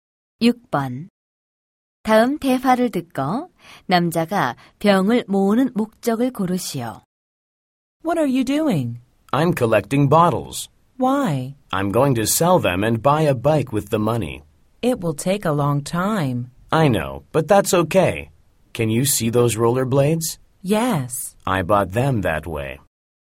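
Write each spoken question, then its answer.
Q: 다음 대화를 듣고 남자가 병을 모으는 목적을 고르시오.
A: 병을 팔아 자전거를 사기 위해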